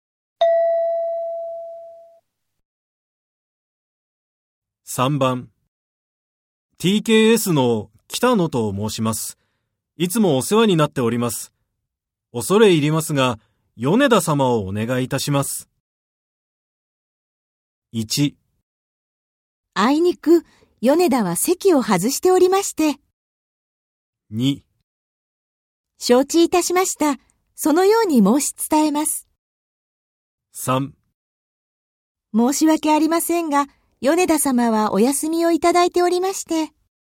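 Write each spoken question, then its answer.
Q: TKS の北野と申します。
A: 1: あいにく、米田は席を外しておりまして。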